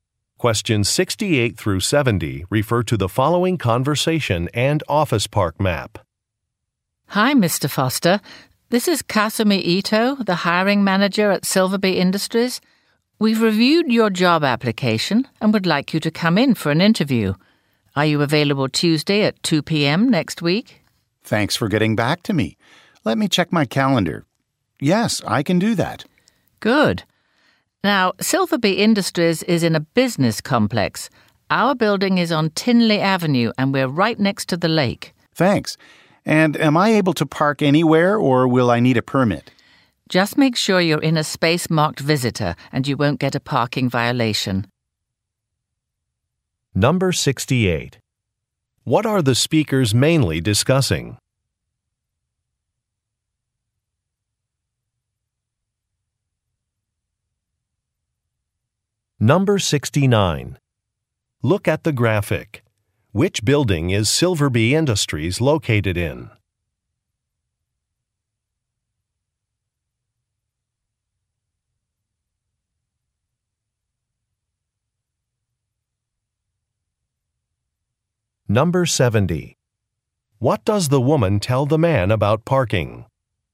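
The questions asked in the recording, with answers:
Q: What are the speakers mainly discussing?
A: A job interview

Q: What does the woman tell the man about parking?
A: Park in a space marked visitor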